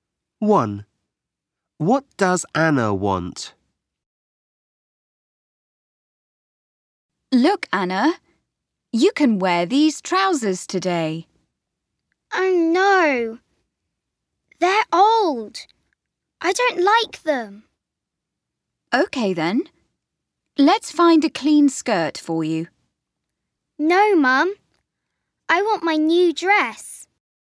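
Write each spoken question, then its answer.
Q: What does Anna want?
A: Her new dress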